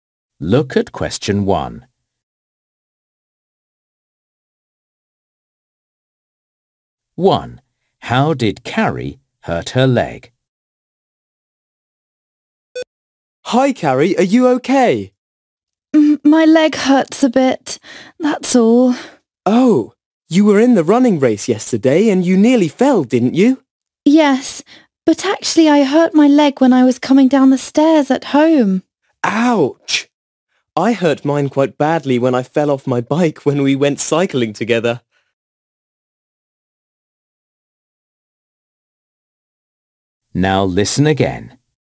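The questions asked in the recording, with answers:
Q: How did Carrie hurt her leg?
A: She hurt it coming down the stairs at home.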